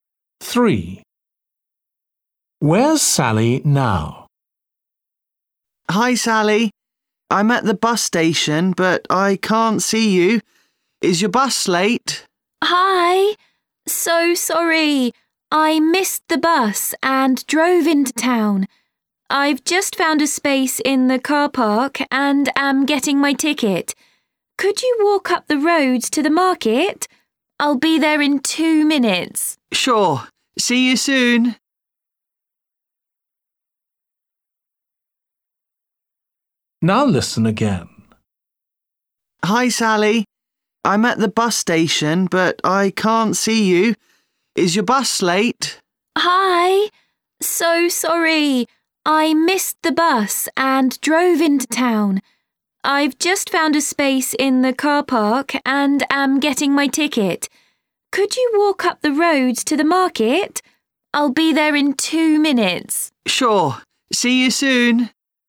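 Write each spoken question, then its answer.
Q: Where's Sally now?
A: in the car park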